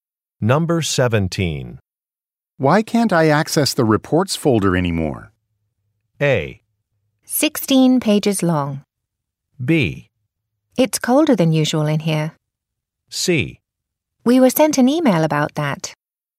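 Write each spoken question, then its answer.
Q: Why can't I access the reports folder anymore?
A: C: We were sent an email about that.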